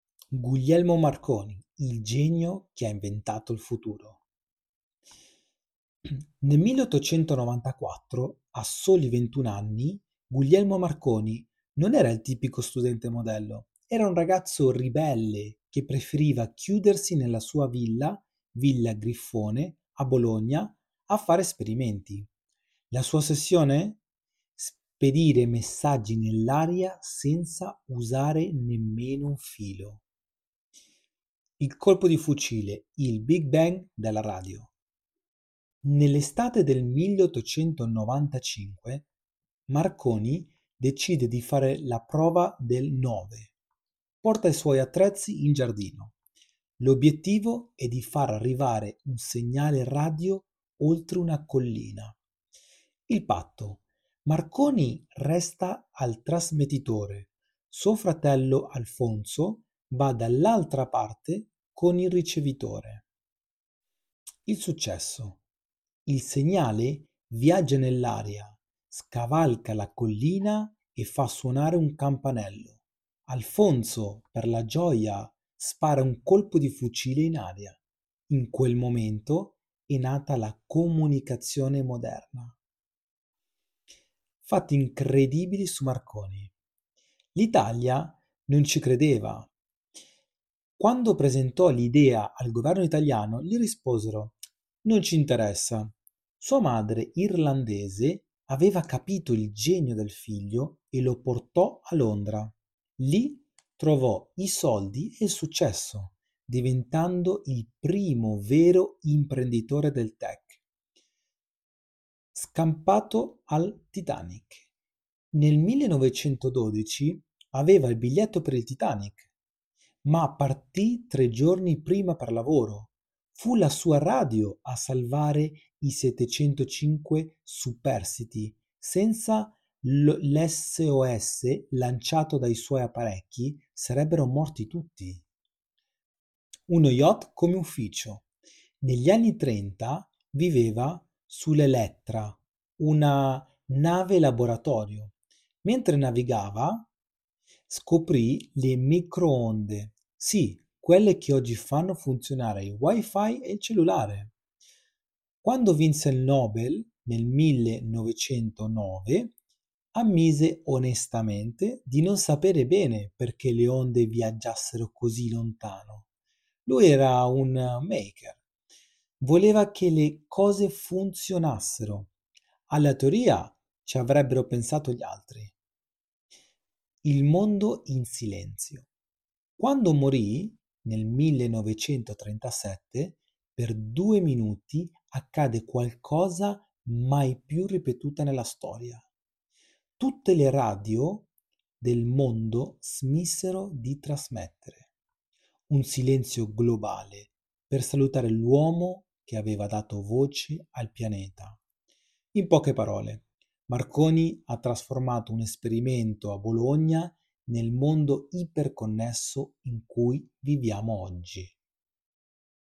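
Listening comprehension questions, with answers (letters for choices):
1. Dove ha effettuato Marconi i suoi primi esperimenti nel 1894?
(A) In un'università di Londra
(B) Nella sua Villa Griffone a Bologna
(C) A bordo del Titanic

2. Qual è stato il segnale che confermò il successo dell'esperimento oltre la collina?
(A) L'accensione di una lampadina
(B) Uno squillo di telefono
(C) Un colpo di fucile sparato dal fratello Alfonso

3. Cosa rispose il governo italiano alla proposta di Marconi?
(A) "Non ci interessa"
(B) "Ti daremo tutti i fondi necessari"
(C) "Aspetta che finisca la guerra"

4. Perché Marconi non si trovava a bordo del Titanic durante il naufragio?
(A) Perché aveva paura dell'oceano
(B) Perché non aveva abbastanza soldi per il biglietto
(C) Perché era partito tre giorni prima per motivi di lavoro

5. Quale tecnologia moderna deriva dalle scoperte fatte da Marconi sullo yacht Elettra?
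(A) Il motore a scoppio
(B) Le microonde (Wi-Fi e cellulari)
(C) La televisione a colori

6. Cosa ha ammesso Marconi durante il discorso per il Premio Nobel nel 1909?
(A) Di aver copiato l'idea da un libro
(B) Di non sapere esattamente perché le onde viaggiassero così lontano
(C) Di preferire la musica alla scienza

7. Cosa accadde in tutto il mondo il giorno del suo funerale nel 1937?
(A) Tutte le radio rimasero in silenzio per due minuti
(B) Tutte le radio trasmisero musica classica per 24 ore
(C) Vennero accesi dei fuochi su ogni collina d'Europa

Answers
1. B
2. C
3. A
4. C
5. B
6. B
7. A

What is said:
Il Genio che ha Inventato il Futuro
Nel 1894, a soli 21 anni, Guglielmo Marconi non era il tipico studente modello. Era un ragazzo ribelle che preferiva chiudersi nella sua villa, Villa Griffone, a Bologna a fare sperimenti. La sua ossessione? Spedire messaggi nell'aria senza usare nemmeno un filo.
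Il colpo di fucile: il "Big Bang" della radio....
Nell'estate del 1895, Marconi decide di fare la prova del nove. Porta i suoi attrezzi in giardino:
L' obbiettivo e di far arrivare un segnale radio oltre una collina.
Il patto:
Marconi resta al trasmettitore; suo fratello Alfonso va dall'altra parte con il ricevitore.
Il successo:
Il segnale viaggia nell'aria, scavalca la collina e fa suonare un campanello. Alfonso, per la gioia, spara un colpo di fucile in aria. In quel momento è nata la comunicazione moderna.
Fatti incredibili su Marconi:
L'Italia non ci credeva: quando presentò l'idea al governo italiano, gli risposero: "Non ci interessa". Sua madre, irlandese aveva capito il genio del figlio e lo portò a Londra. Lì trovò i soldi e il successo, diventando il primo vero "imprenditore del tech".
Scampato al Titanic: Nel 1912 aveva il biglietto per il Titanic, ma partì tre giorni prima per lavoro. 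Fu la sua radio a salvare i 705 superstiti: senza l'SOS lanciato dai suoi apparecchi, sarebbero morti tutti.
Uno yacht come ufficio: Negli anni '30 viveva sull'Elettra, una nave-laboratorio. Mentre navigava, scoprì le microonde: sì, quelle che oggi fanno funzionare il tuo Wi-Fi e il tuo cellulare!
Quando vinse il Nobel nel 1909, ammise onestamente di non sapere bene perché le onde viaggiassero così lontano. Lui era un "maker": voleva che le cose funzionassero, alla teoria ci avrebbero pensato gli altri.
Il mondo in silenzio: Quando morì nel 1937, per due minuti accadde una cosa mai più ripetuta: tutte le radio del mondo smisero di trasmettere. Un silenzio globale per salutare l'uomo che aveva dato voce al pianeta.
In poche parole: Marconi ha trasformato un esperimento a Bologna nel mondo iper-connesso in cui viviamo oggi.
Marconi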